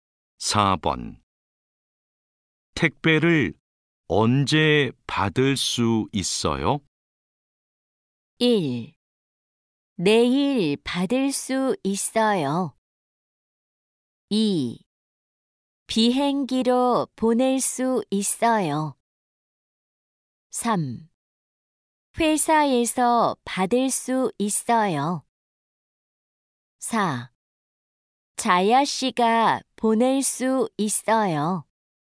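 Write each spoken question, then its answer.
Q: 택배를 언제 받을 수 있어요?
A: 1: 내일 받을 수 있어요.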